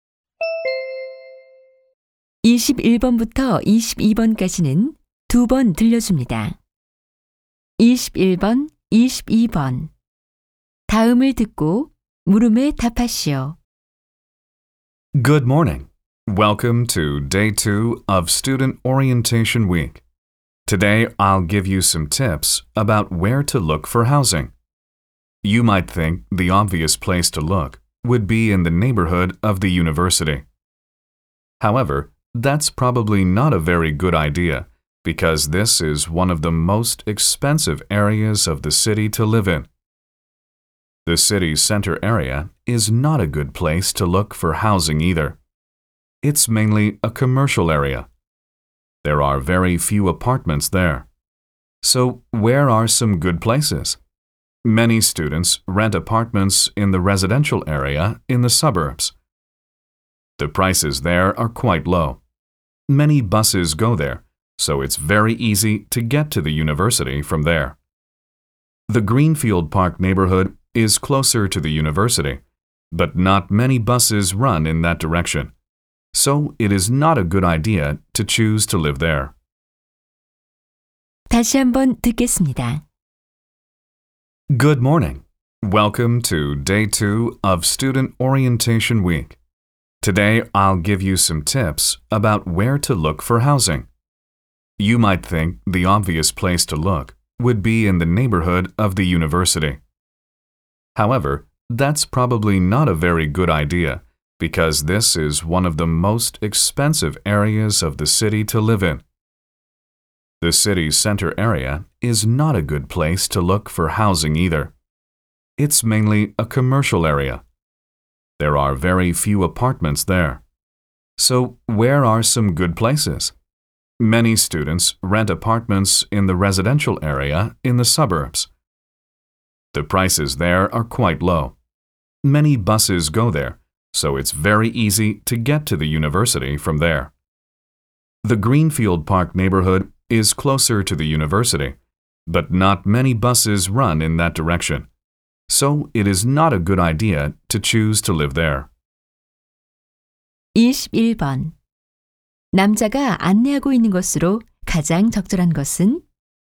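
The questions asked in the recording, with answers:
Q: 남자가 안내하고 있는 것으로 가장 적절한 것은?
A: 학생들이 살 집을 구할 곳에 관한 조언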